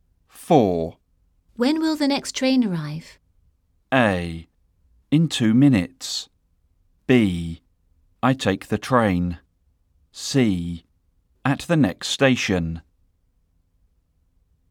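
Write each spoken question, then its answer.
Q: When will the next train arrive?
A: A: In 2 minutes.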